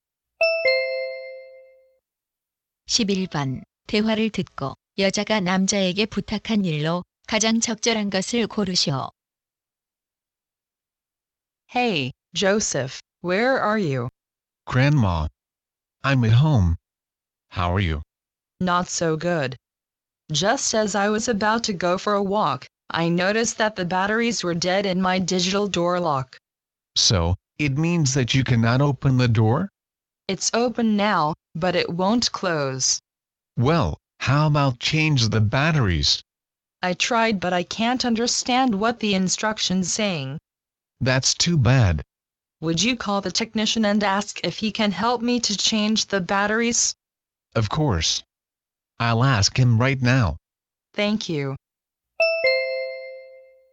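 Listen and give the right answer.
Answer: 기술자에게 전화해서 배터리 교체를 도와달라고 부탁하기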